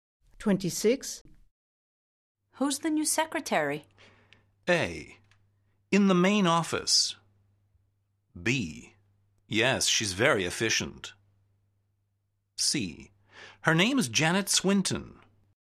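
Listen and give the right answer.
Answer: C: Her name is Janet Swinton.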